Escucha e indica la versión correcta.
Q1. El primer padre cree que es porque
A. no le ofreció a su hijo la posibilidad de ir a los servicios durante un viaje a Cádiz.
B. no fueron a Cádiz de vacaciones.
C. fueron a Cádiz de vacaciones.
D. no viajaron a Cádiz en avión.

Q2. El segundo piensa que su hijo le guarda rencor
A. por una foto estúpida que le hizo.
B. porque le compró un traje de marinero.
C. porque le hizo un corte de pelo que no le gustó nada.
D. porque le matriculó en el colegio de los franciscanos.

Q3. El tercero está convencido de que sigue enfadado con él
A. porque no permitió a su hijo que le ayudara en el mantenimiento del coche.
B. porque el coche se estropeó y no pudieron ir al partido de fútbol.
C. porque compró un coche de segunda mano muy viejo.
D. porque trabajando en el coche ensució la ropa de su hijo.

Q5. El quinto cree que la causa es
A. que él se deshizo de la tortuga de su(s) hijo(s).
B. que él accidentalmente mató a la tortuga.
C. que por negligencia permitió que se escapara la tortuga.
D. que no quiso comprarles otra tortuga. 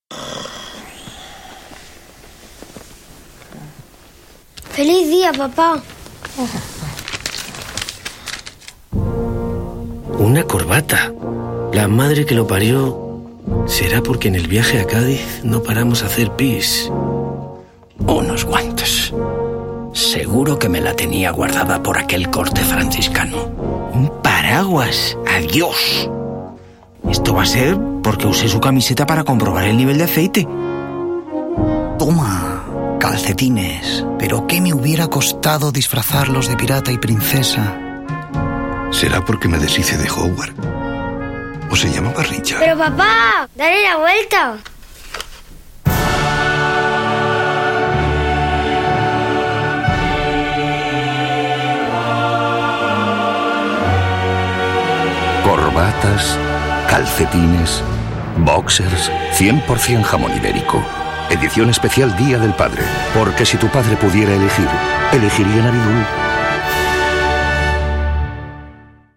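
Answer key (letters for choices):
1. A
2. C
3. D
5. A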